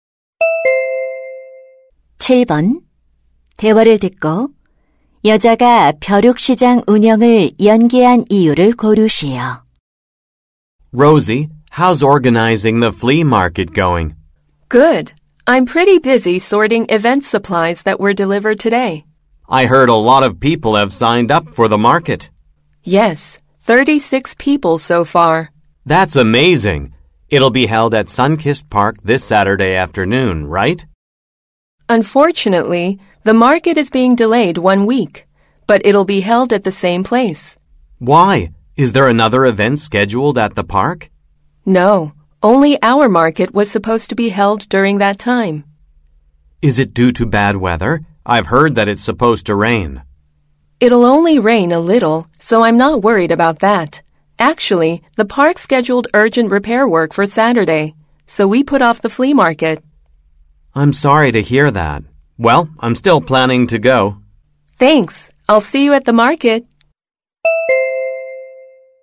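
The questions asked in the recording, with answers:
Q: 대화를 듣고 여자가 벼룩시장 운영을 연기한 이유를 고르시오.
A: 공원의 긴급 보수 공사 때문에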